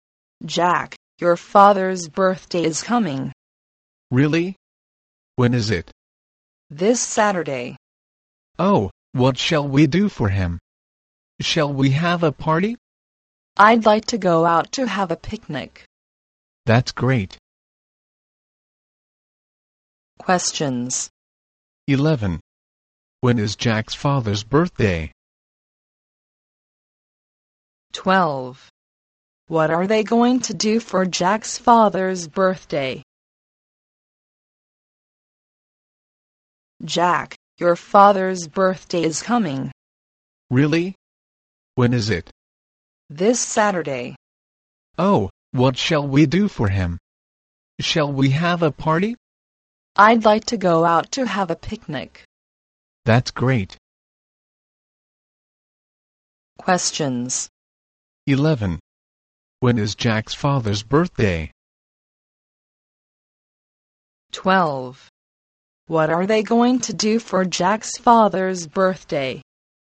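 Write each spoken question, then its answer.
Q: When is Jack's father's birthday?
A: This Saturday

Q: What are they going to do for Jack's father's birthday?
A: Go out for a picnic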